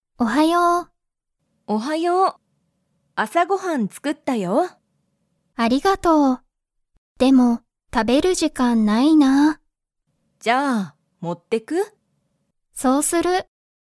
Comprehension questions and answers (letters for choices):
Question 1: アミは今いま、朝あさご飯はんを食たべますか?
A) はい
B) いいえ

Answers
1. B

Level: Level 1